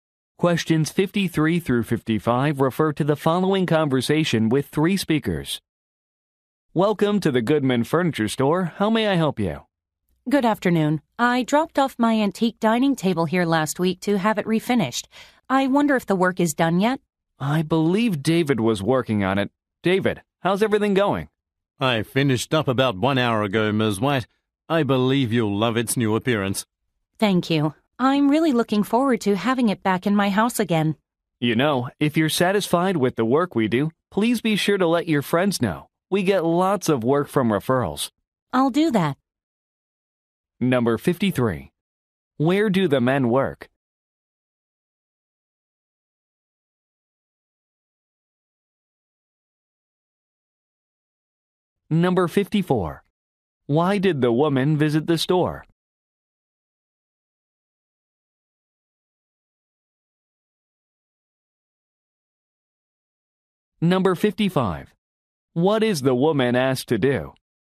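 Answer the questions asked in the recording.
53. At a furniture store
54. To pick up her refinished dining table
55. Tell her friends about the store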